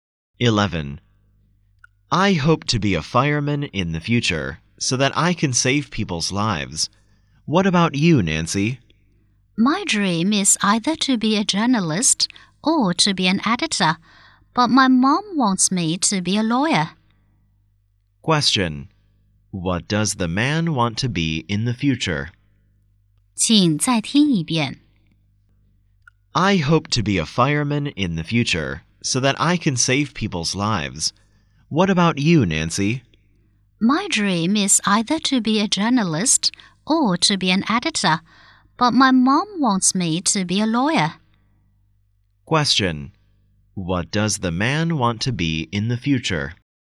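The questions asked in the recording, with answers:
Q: What does the man want to be in the future?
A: A fireman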